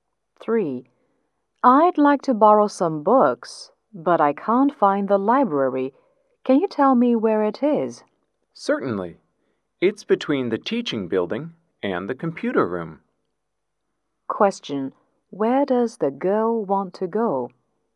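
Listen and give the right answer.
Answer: The library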